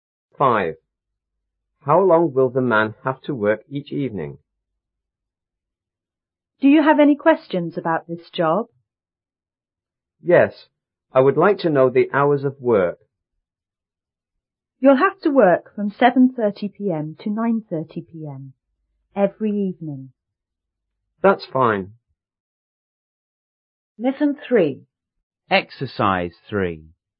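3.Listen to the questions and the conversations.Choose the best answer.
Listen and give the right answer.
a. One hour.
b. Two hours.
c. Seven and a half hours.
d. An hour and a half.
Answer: b. Two hours.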